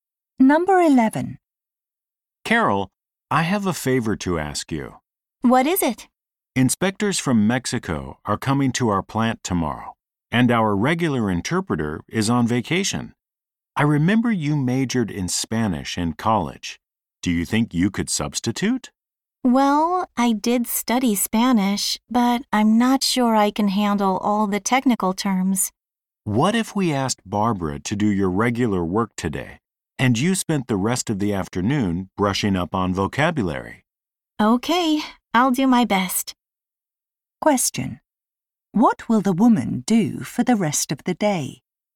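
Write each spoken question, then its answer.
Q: Question: What will the woman do for the rest of the day?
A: Study Spanish technical vocabulary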